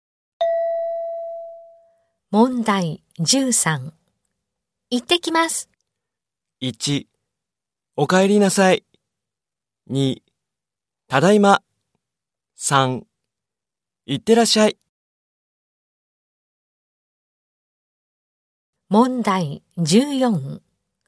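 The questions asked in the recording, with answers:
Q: 行ってきます。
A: 3: 行ってらっしゃい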